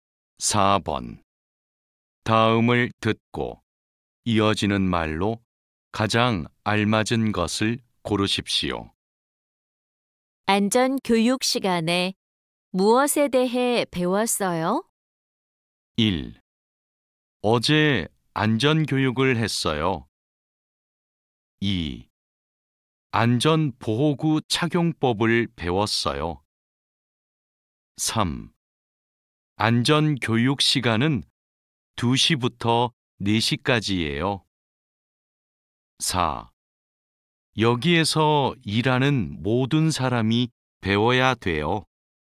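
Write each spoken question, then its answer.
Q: 안전 교육 시간에 무엇에 대해 배웠어요?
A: 2: 안전 보호구 착용법을 배웠어요.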